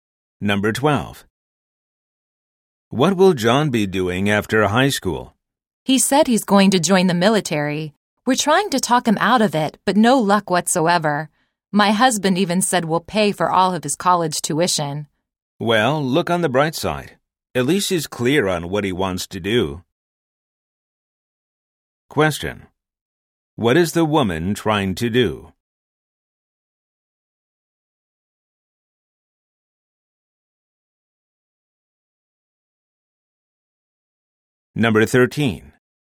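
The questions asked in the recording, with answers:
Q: What is the woman trying to do?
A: Talk her son John out of joining the military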